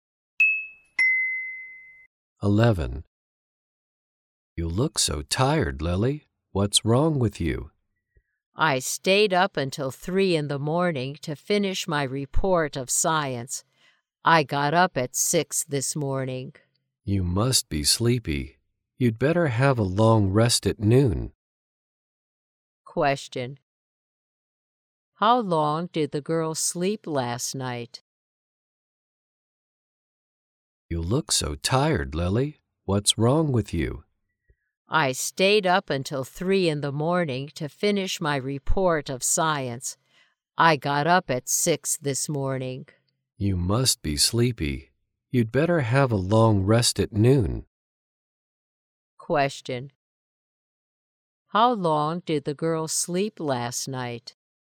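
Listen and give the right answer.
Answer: Three hours.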